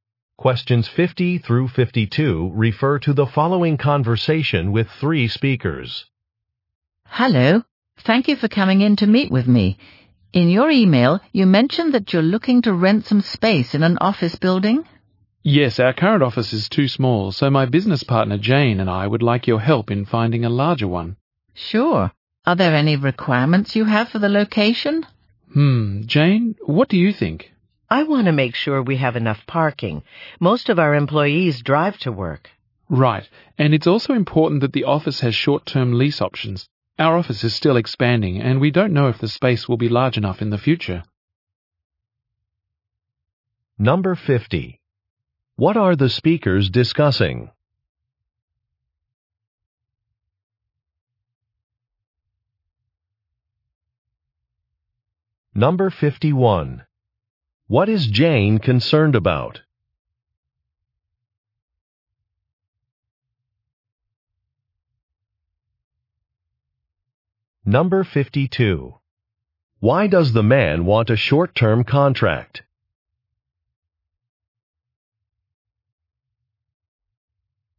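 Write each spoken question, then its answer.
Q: What are the speakers discussing?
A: Renting a larger office space

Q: What is Jane concerned about?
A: Having enough parking

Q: Why does the man want a short-term contract?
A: The business is still expanding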